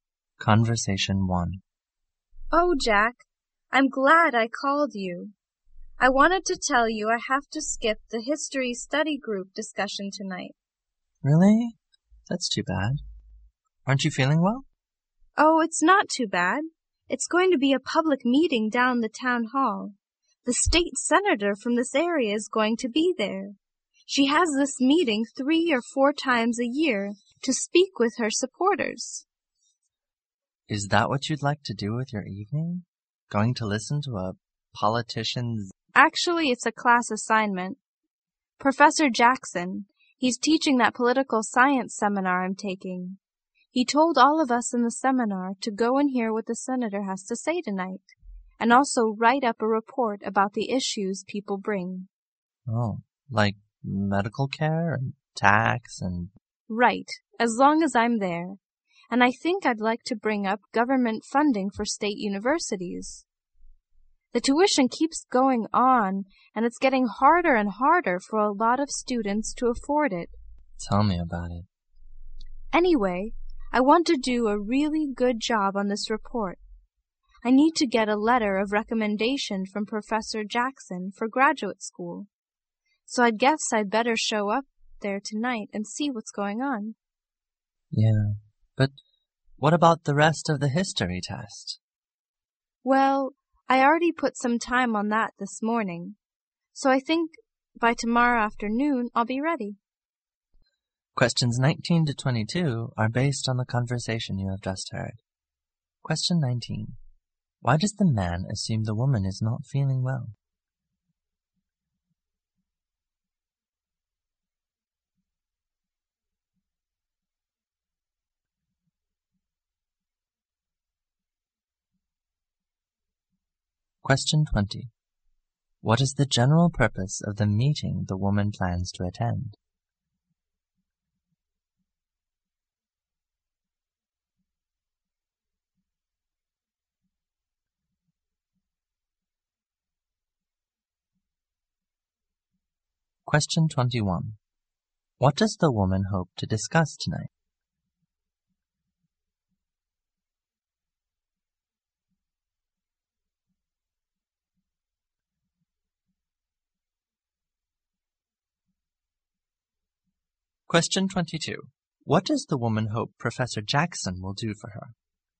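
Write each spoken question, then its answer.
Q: Why does the man assume the woman is not feeling well?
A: Because she says she has to skip the history study group discussion tonight

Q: What is the general purpose of the meeting the woman plans to attend?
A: For the state senator to speak with her supporters

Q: What does the woman hope to discuss tonight?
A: Government funding for state universities

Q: What does the woman hope Professor Jackson will do for her?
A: Write her a letter of recommendation for graduate school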